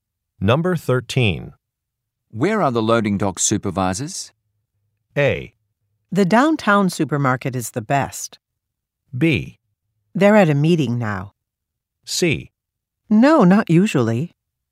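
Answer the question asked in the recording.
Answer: B: They're at a meeting now.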